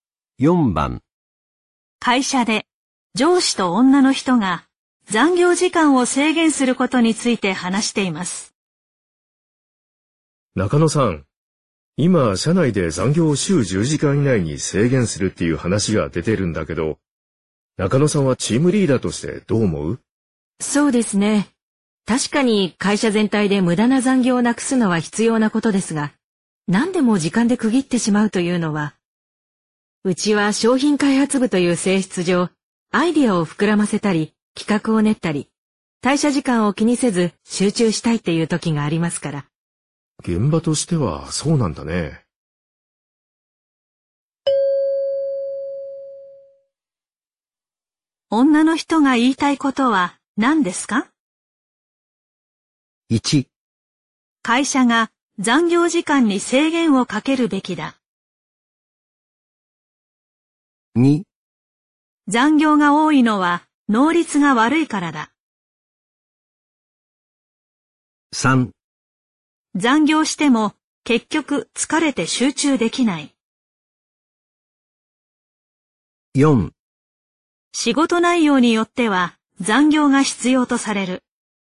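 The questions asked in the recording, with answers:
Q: 女の人が言いたいことは何ですか?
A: 4: 仕事内容によっては残業が必要とされる。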